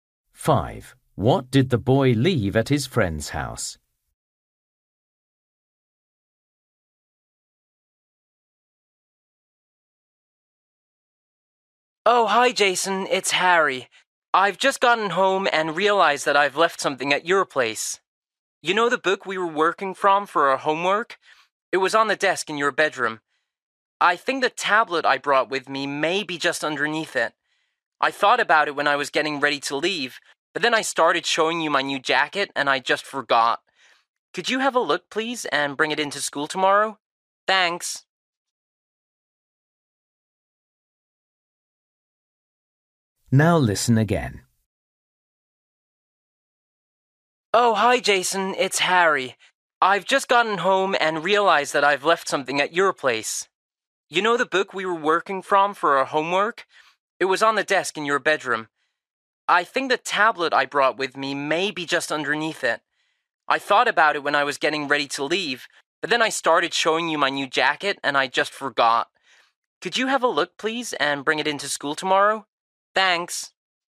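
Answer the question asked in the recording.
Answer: His tablet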